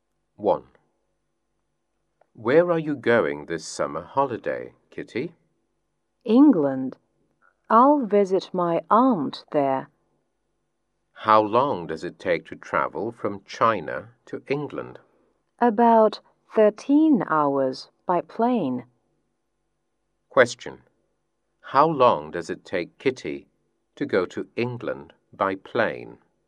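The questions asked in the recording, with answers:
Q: Question. How long does it take Kitty to go to England by plane?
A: About 13 hours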